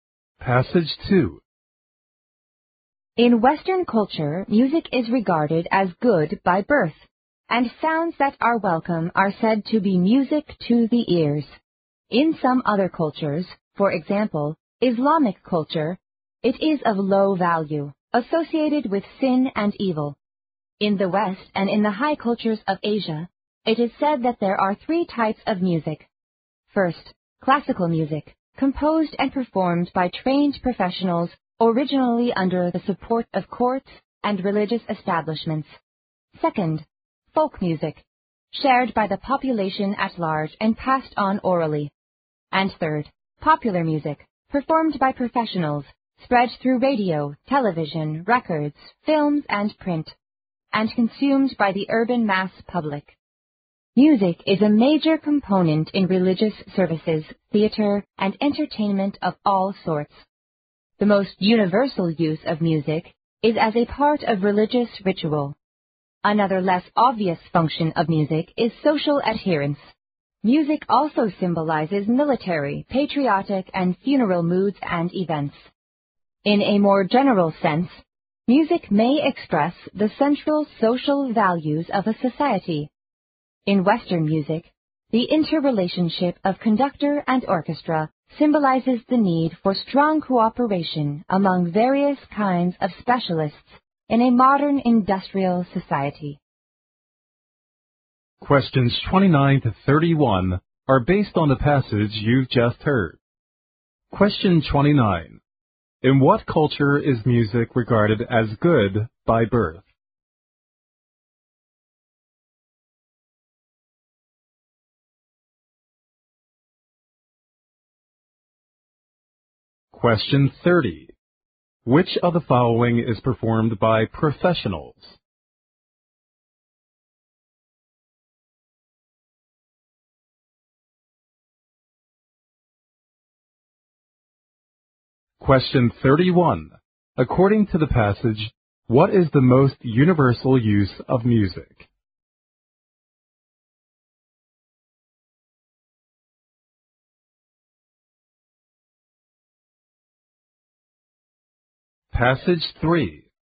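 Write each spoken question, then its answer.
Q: In what culture is music regarded as good by birth?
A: Western culture

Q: According to the passage, what is the most universal use of music?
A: As part of religious ritual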